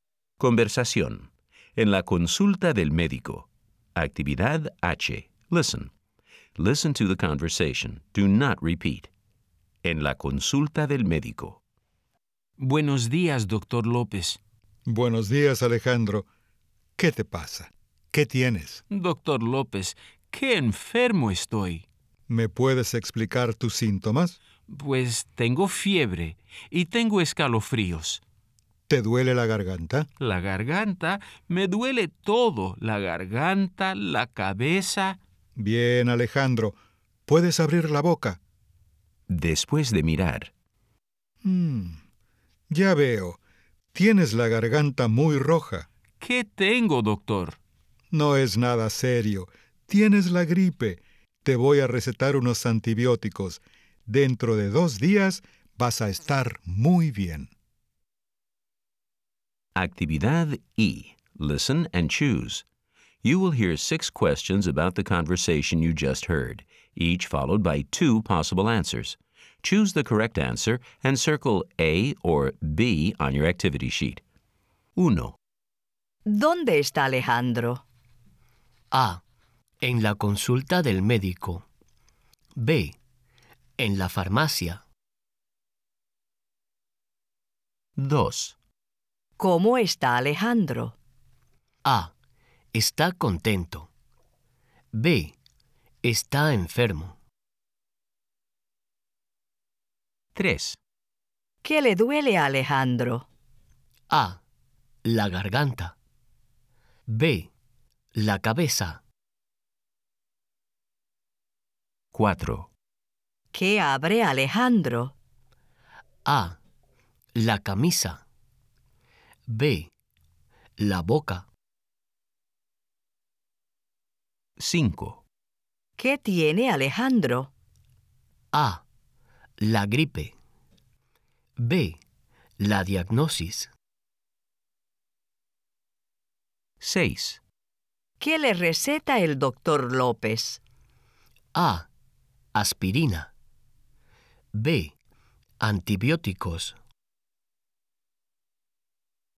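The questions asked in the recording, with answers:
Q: ¿Dónde está Alejandro?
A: A: En la consulta del médico.

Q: ¿Cómo está Alejandro?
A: B: Está enfermo.

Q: ¿Qué abre Alejandro?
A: B: La boca.

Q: ¿Qué tiene Alejandro?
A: A: La gripe.

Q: ¿Qué le receta el doctor López?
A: B: Antibióticos.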